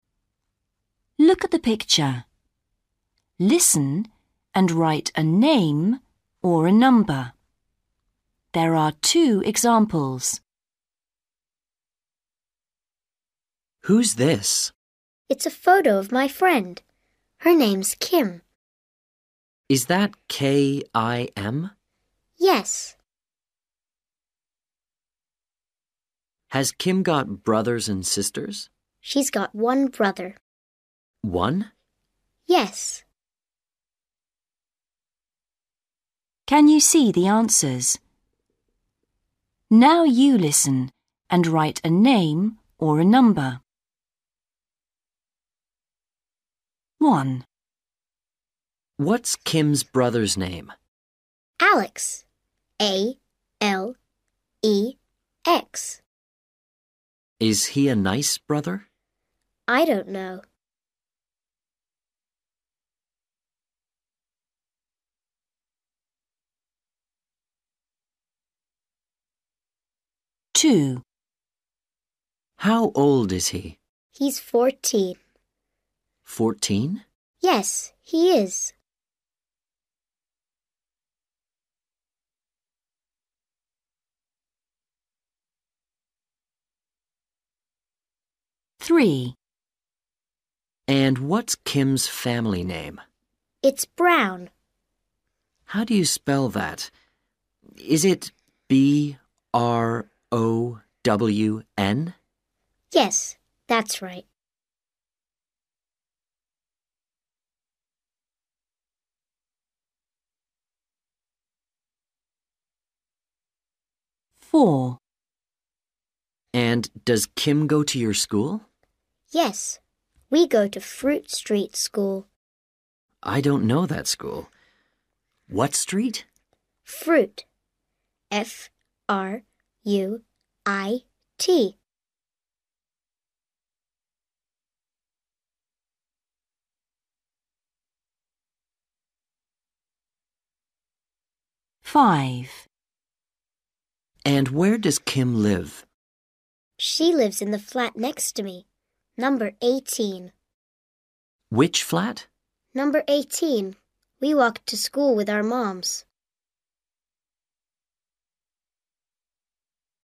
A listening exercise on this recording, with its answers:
Read the question. Listen and write a name or a number.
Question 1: What's Kim's brother's name? ...........................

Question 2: How old is Kim's brother? ...........................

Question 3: What's Kim's family name? ...........................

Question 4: What's the name of Kim's school? ........................... Street School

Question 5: What number is Kim's flat? ...........................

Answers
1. Alex
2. 14/fourteen
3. Brown
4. Fruit
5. 18/eighteen

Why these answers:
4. GIRL: Yes. We go to Fruit Street School.
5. GIRL: She lives in the flat next to me. Number 18.

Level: Starters